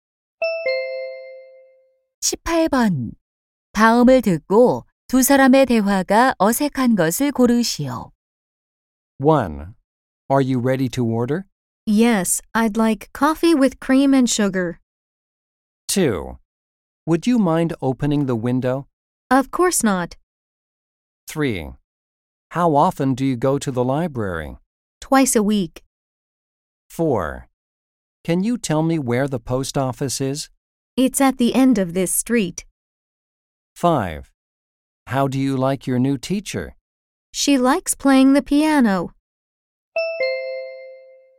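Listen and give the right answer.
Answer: 5: How do you like your new teacher? - She likes playing the piano.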